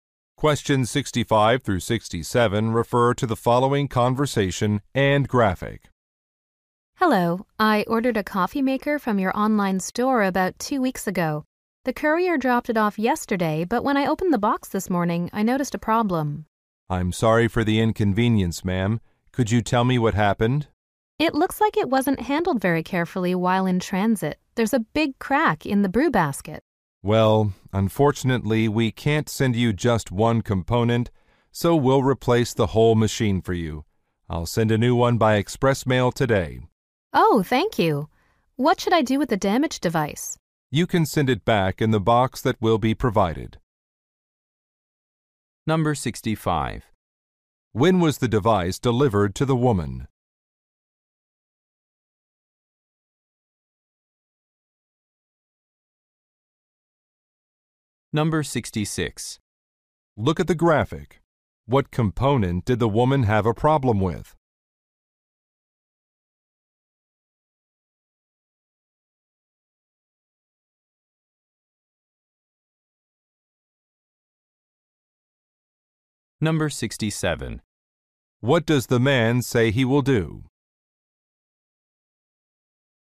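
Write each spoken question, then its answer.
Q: When was the device delivered to the woman?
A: Yesterday

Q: What does the man say he will do?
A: Send a new machine by express mail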